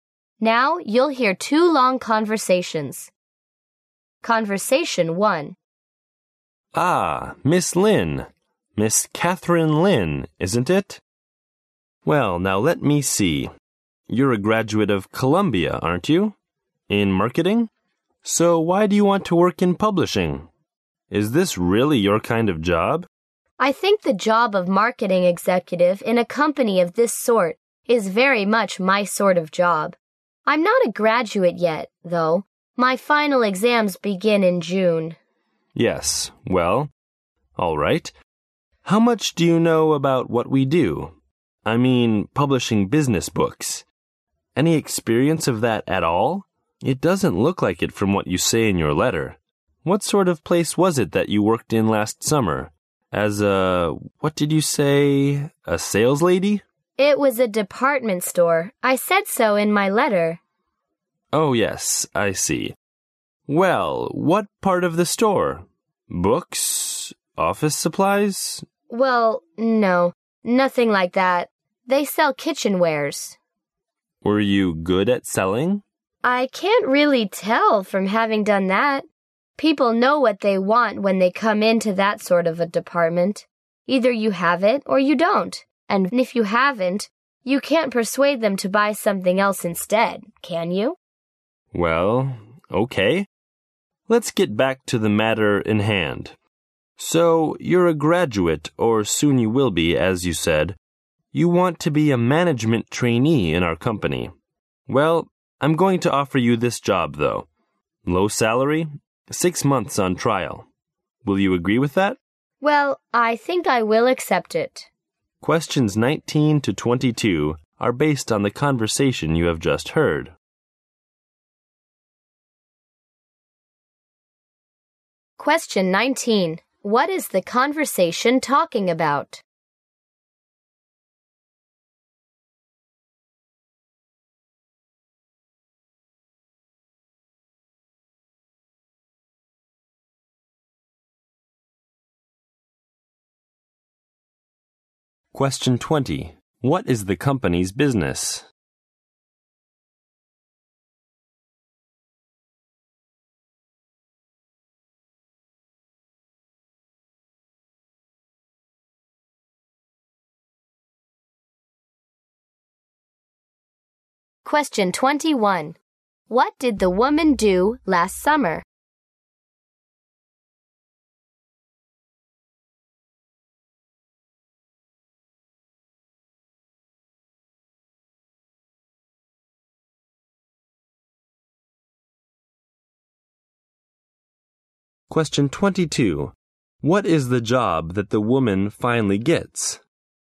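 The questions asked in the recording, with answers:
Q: What is the conversation talking about?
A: A job interview

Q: What is the company's business?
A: Publishing business books

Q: What did the woman do last summer?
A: She sold kitchenware in a department store

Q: What is the job that the woman finally gets?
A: Management trainee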